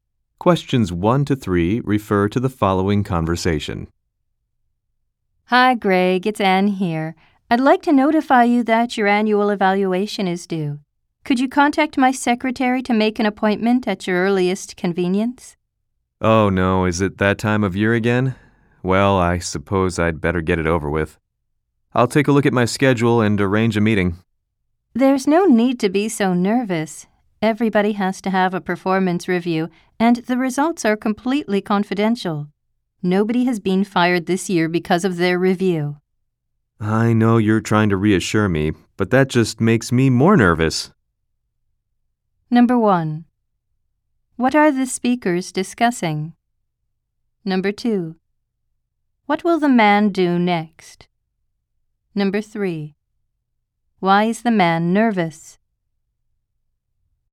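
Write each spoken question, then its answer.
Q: What are the speakers discussing?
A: The man's annual evaluation (performance review)

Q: What will the man do next?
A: Check his schedule and arrange a meeting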